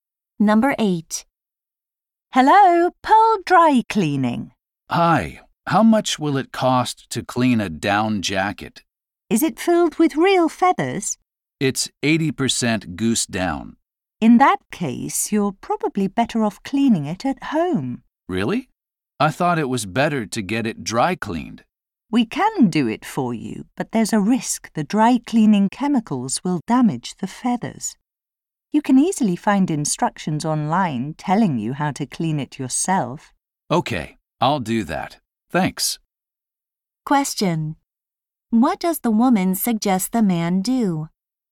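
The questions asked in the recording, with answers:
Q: What does the woman suggest the man do?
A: Clean the down jacket himself at home.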